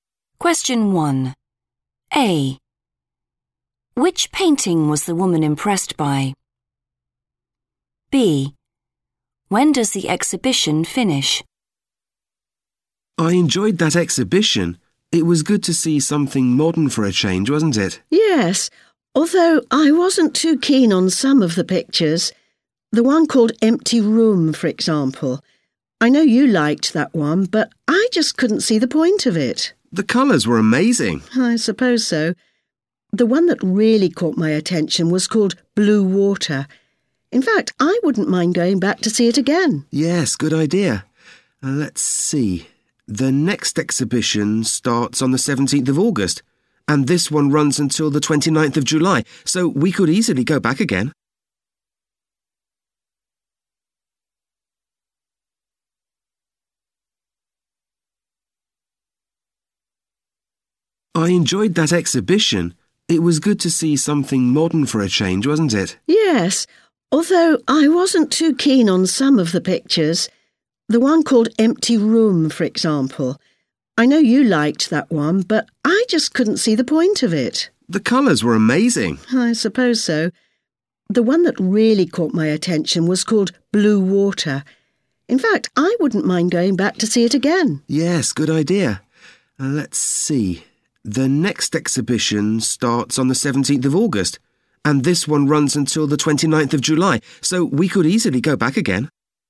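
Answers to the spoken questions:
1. Blue Water
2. 29th of July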